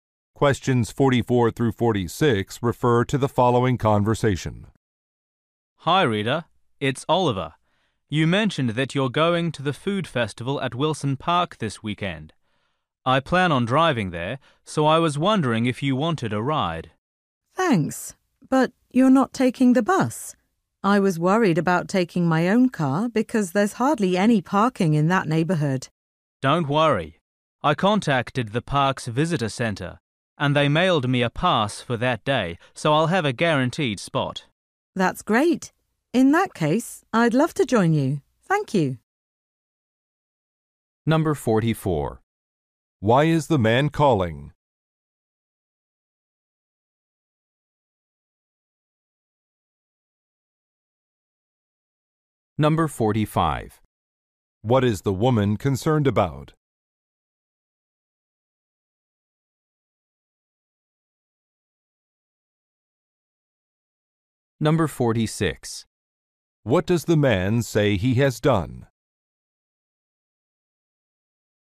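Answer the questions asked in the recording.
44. To offer her a ride to the food festival
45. There is hardly any parking in the area
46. He got a parking pass from the park's visitor center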